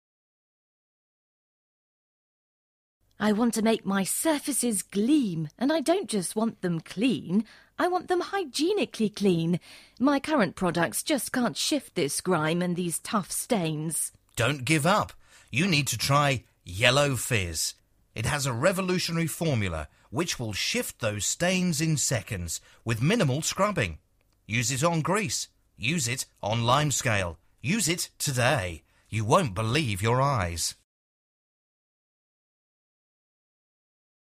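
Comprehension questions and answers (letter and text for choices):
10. What is this an advert for?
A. kitchen cleaner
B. toothpaste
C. shower gel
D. washing powder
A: A. kitchen cleaner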